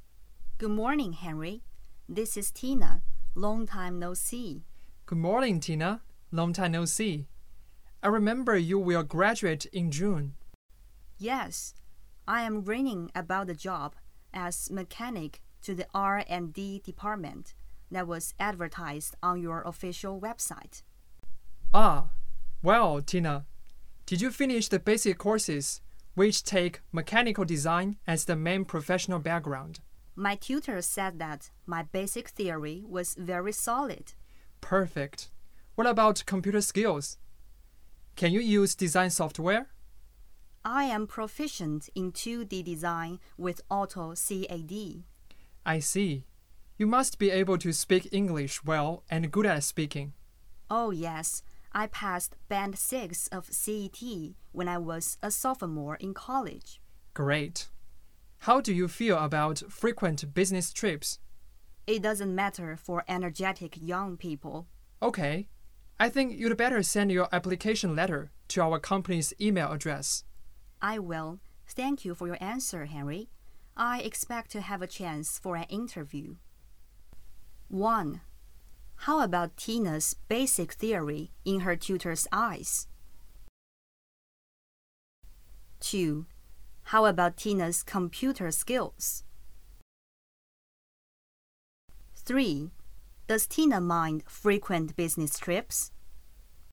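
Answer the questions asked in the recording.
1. Very solid
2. She is proficient in 2D design with AutoCAD
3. No, it doesn't matter for energetic young people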